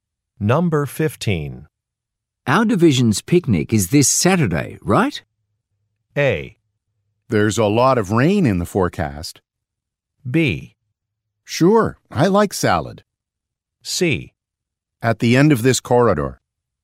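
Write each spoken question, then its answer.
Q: Our division's picnic is this Saturday, right?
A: A: There's a lot of rain in the forecast.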